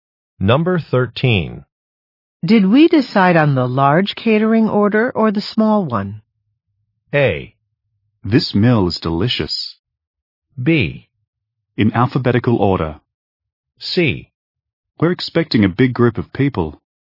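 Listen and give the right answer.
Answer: C: We're expecting a big group of people.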